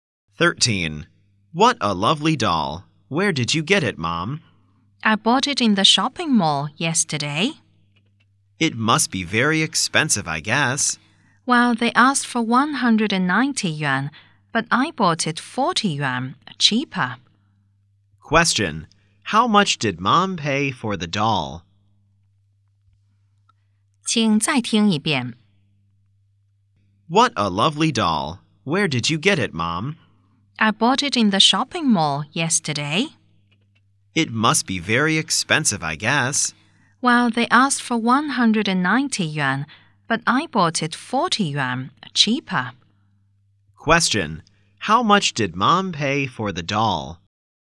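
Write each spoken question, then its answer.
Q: Question: How much did Mom pay for the doll?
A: 150 yuan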